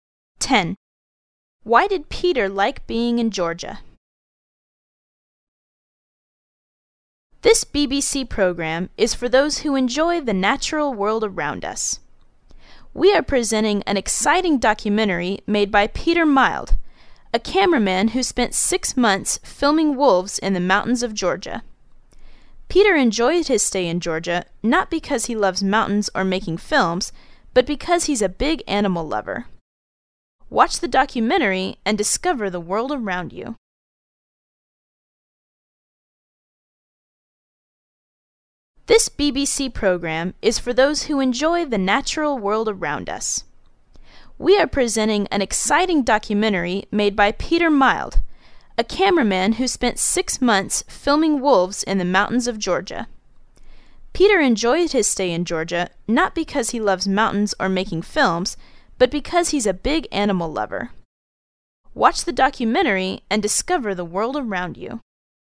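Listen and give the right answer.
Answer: Because he is a big animal lover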